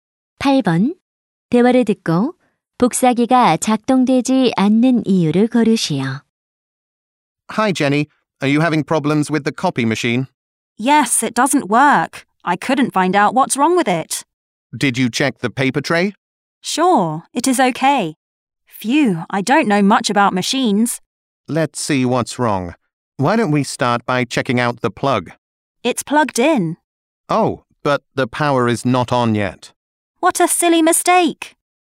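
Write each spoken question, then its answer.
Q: 대화를 듣고 복사기가 작동되지 않는 이유를 고르시오.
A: 전원이 켜져 있지 않아서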